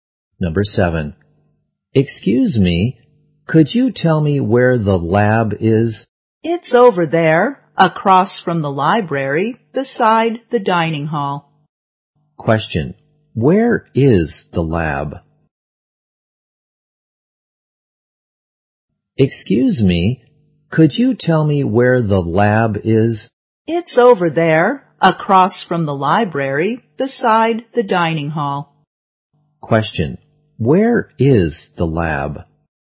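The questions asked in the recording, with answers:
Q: where is the lab?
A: Across from the library, beside the dining hall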